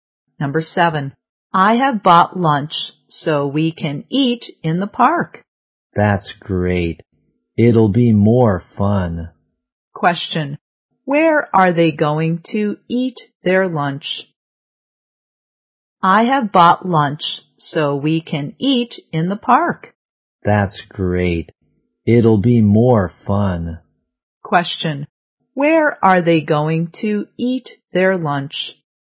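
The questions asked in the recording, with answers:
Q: where are they going to eat their lunch?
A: In the park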